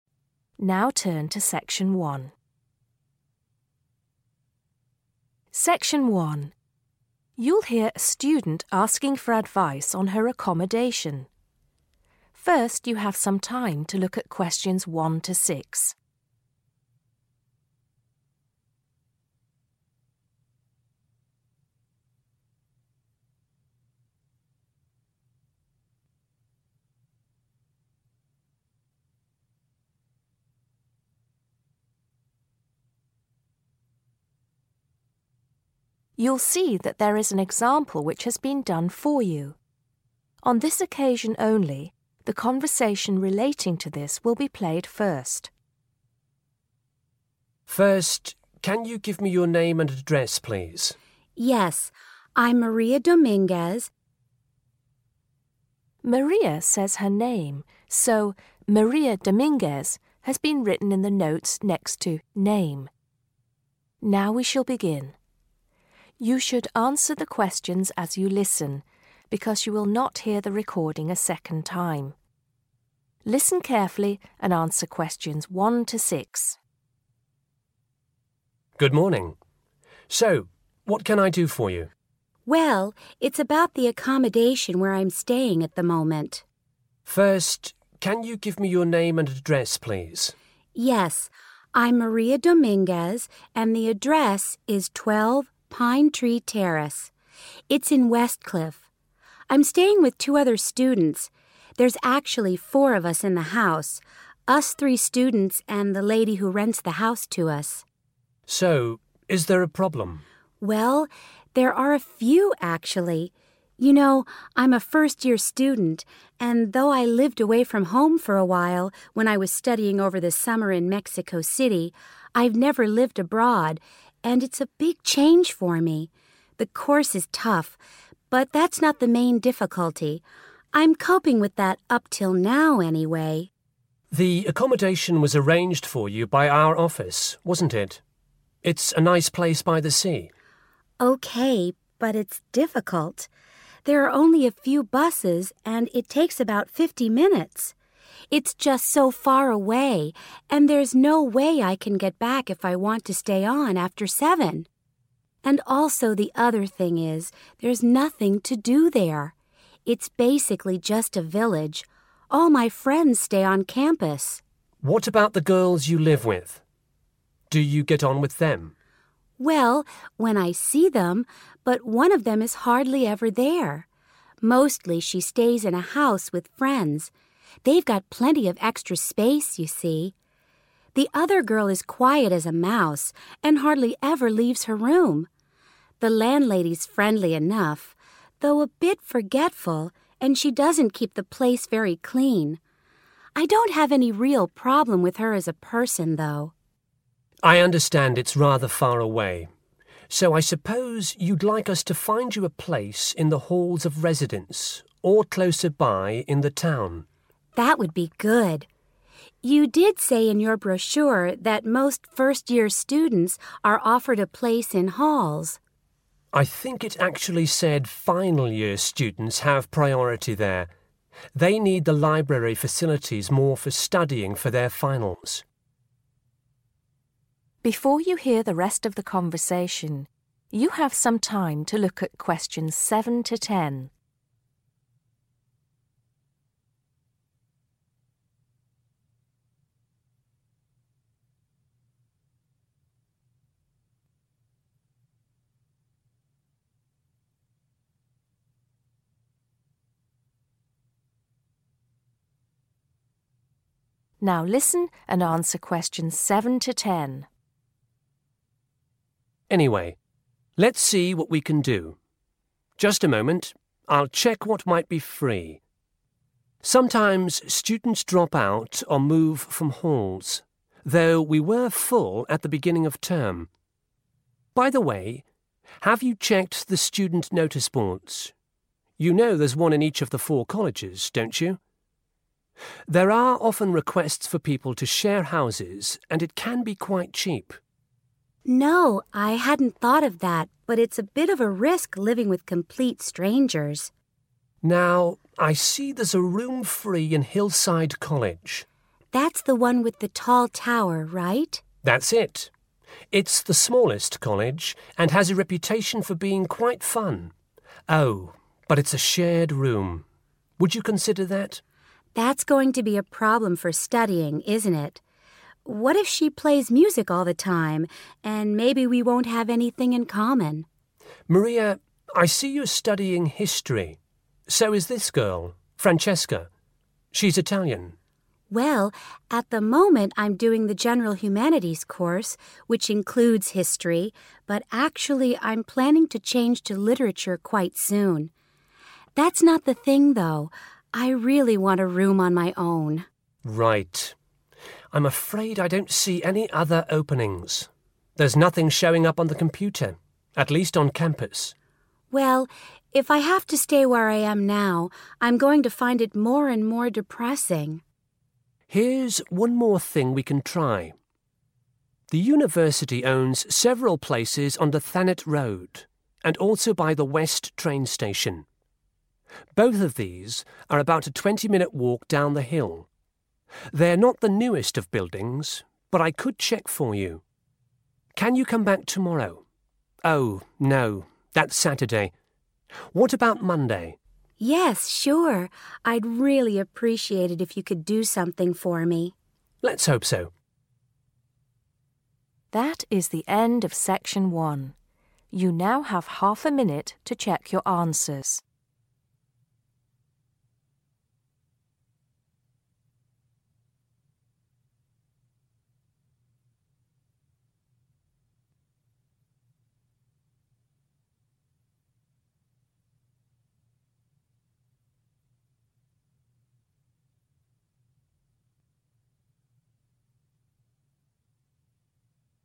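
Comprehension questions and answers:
Complete the notes below.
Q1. Present address: 1................. , Pine Tree Terrace, Westcliff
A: 12

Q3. First time Maria has lived 3..................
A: abroad

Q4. Journey time to the university: 4.................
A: 50 minutes

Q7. Where does the adviser suggest Maria could check to find accommodation?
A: student notice boards

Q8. In which college is there a space to share a room?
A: Hillside College

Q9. Which subject is Maria going to change to?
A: literature

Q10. When will Maria return to the accommodation office?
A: Monday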